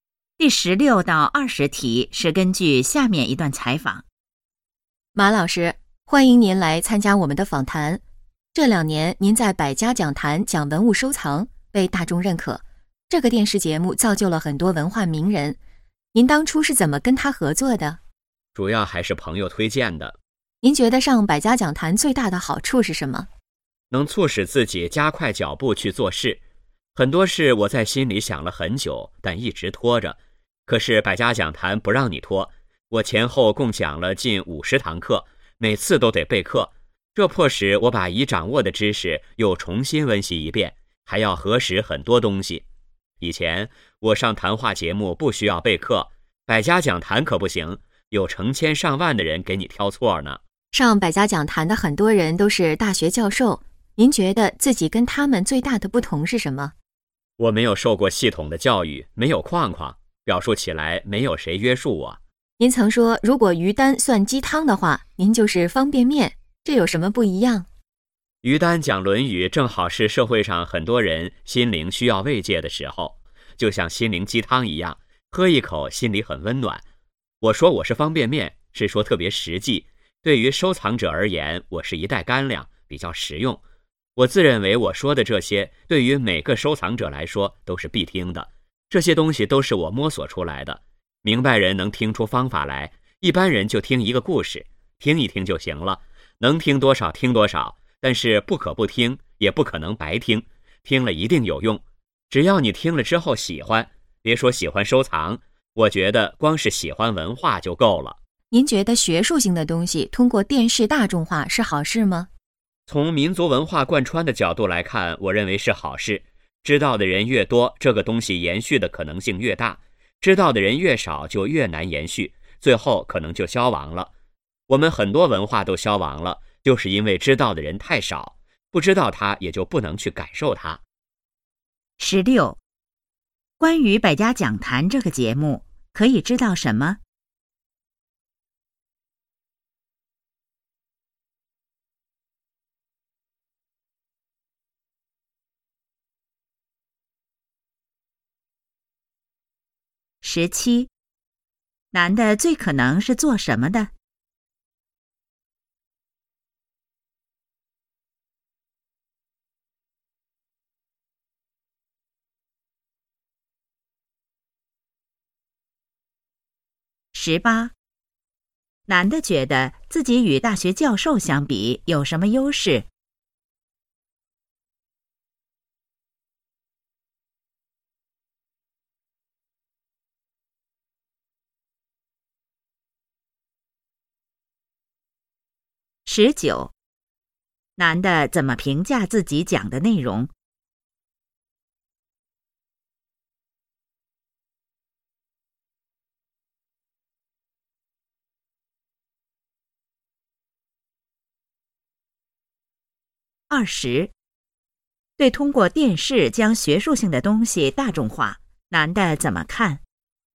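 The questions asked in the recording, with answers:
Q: 男的最可能是做什么的?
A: 文物收藏专家

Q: 男的觉得自己与大学教授相比有什么优势?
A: 没有框框,表述不受约束

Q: 男的怎么评价自己讲的内容?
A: 特别实际、实用

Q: 对通过电视将学术性的东西大众化,男的怎么看?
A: 是好事,有利于文化延续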